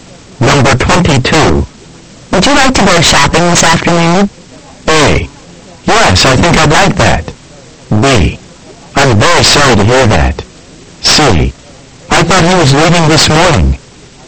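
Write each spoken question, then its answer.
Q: Would you like to go shopping this afternoon?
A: A: Yes, I think I'd like that.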